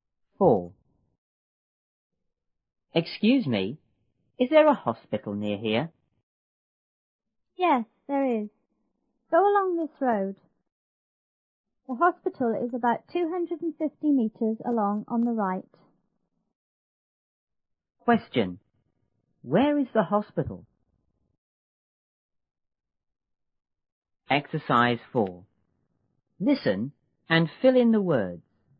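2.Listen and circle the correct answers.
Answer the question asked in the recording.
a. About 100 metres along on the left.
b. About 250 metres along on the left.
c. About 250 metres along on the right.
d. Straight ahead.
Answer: c. About 250 metres along on the right.

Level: 初中英语广州版1B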